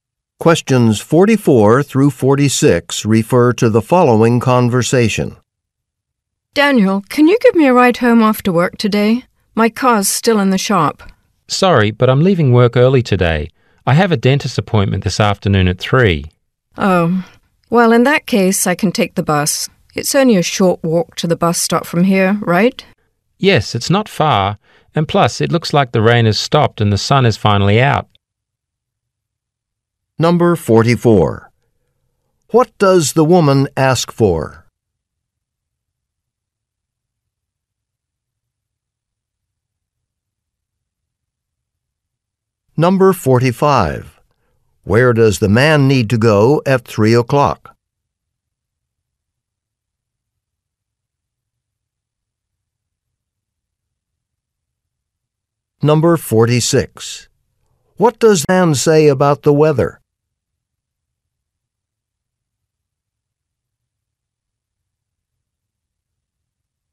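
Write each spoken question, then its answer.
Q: What does the woman ask for?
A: A ride home after work

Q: Where does the man need to go at 3 o'clock?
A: To the dentist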